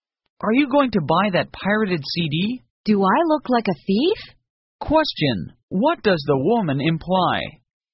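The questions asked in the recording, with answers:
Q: what does the woman imply?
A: She won't buy the pirated CD.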